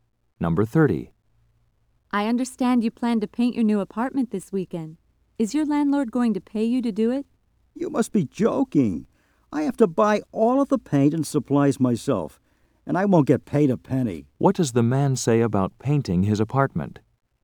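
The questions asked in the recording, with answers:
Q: What does the man say about painting his apartment?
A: He must pay for everything and won't be paid.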